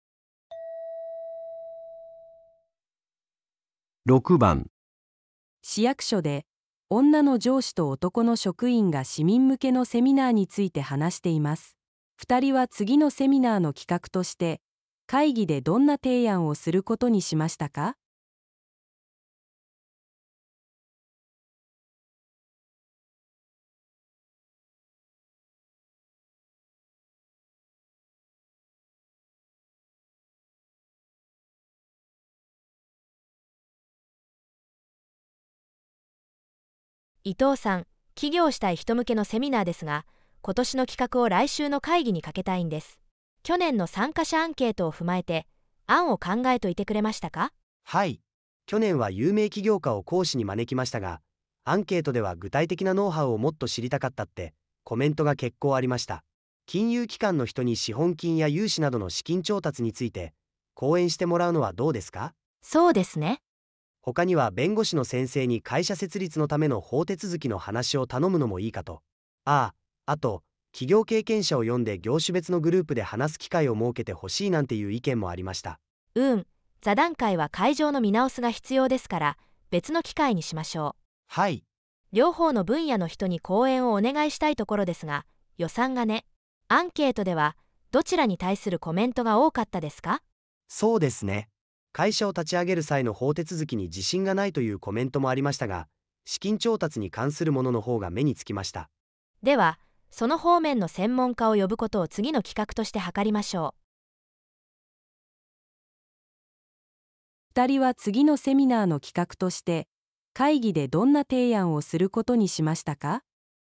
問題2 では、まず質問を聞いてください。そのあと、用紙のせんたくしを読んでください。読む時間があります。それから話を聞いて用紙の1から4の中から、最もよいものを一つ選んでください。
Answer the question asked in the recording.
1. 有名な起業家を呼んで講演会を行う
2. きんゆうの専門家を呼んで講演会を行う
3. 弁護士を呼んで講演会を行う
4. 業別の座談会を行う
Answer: 2. きんゆうの専門家を呼んで講演会を行う

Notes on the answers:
问题:两人决定在会议上提出什么研讨会提案? 正确选项:2. 邀请金融专家举办讲座 1.❌错误 → 去年已实施("去年は有名企業家を講師に招きました"),今年不重复。 2.✅正确 → 女上司最终决策「資金調達の専門家を呼ぶ」(根据问卷反馈优先级和预算限制)。 3.❌错误 → 律师提议虽存在,但因「预算有限」且问卷反馈量不及资金问题,未被选中。 4.❌错误 → 分组讨论因场地问题被明确推迟("別の機会に")。

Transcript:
女:伊藤さん、起業したい人向けのセミナーですが、今年の企画を来週の会議にかけたいんです。去年の参加者アンケートを踏まえて案を考えておいてくれましたか?
男:はい、去年は有名企業家を講師に招きましたが、アンケートでは具体的なノウハウをもっと知りたかったってコメントが結構ありました。金融機関の人に資本金や融資などの資金調達について講演してもらうのはどうですか?
女:そうですね。
男:他には弁護士の先生に会社設立のための法手続きの話を頼むのもいいかと。あっ、あと、企業経験者を呼んで業種別のグループで話す機会を設けてほしいなんていう意見もありました。
女:うーん、座談会は会場の見直しが必要ですから、別の機会にしましょう。両方の分野の人に講演をお願いしたいところですが、予算がね。アンケートではどちらに対するコメントが多かったですか?
男:そうですね、会社を立ち上げる際の法手続きに自信がないというコメントもありましたが、資金調達に関するものの方が目につきました。
女:では、その方面の専門家を呼ぶことを次の企画として図りましょう。

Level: N1